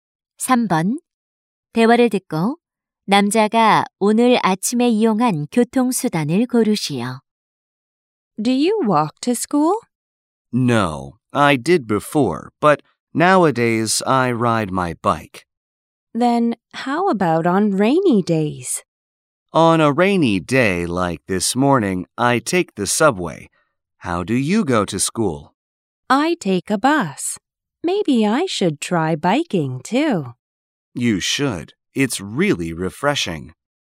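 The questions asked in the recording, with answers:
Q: 대화를 듣고 남자가 오늘 아침에 이용한 교통수단을 고르시오.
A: 지하철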